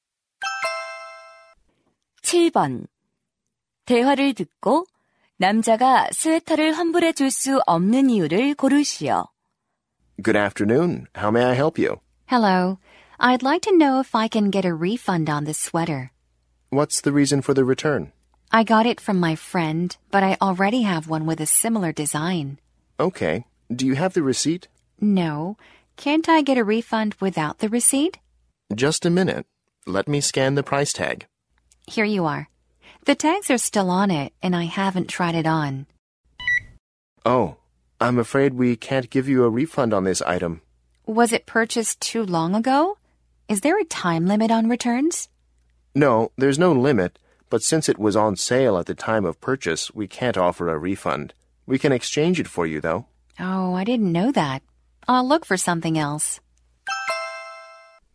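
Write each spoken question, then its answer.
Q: 대화를 듣고 남자가 스웨터를 환불해 줄 수 없는 이유를 고르시오.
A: 할인 판매 상품이라서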